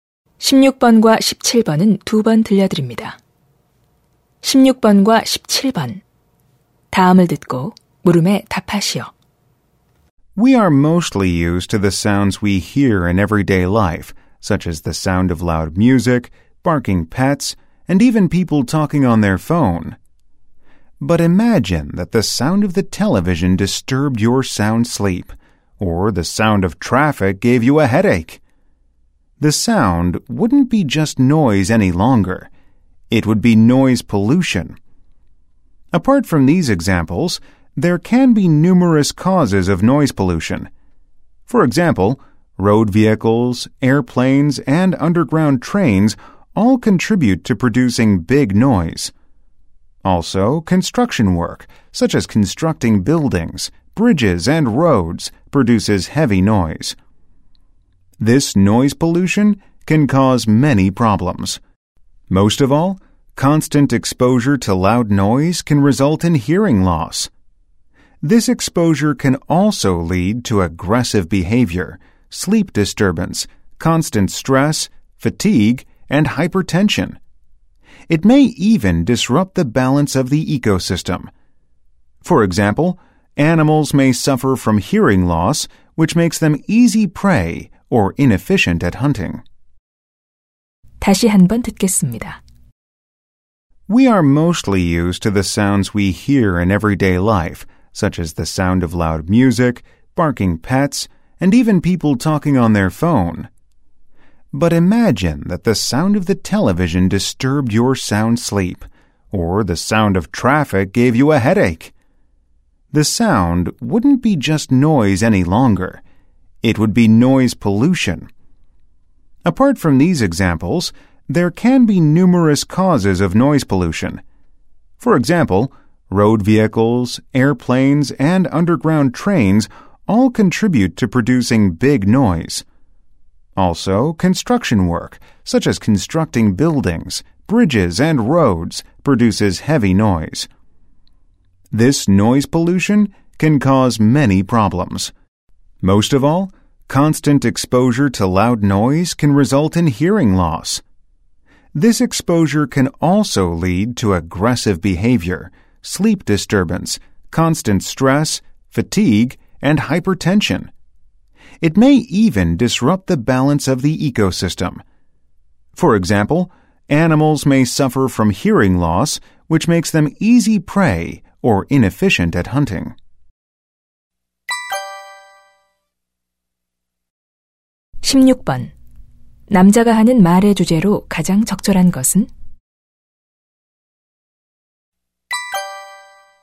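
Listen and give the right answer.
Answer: 소음 공해의 원인과 영향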